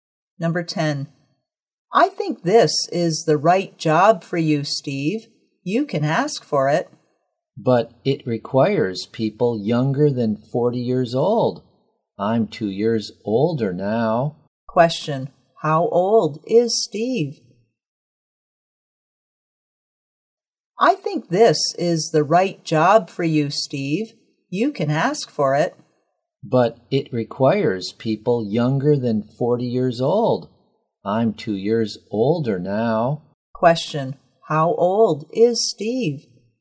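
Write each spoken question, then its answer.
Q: Question. How old is Steve?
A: 42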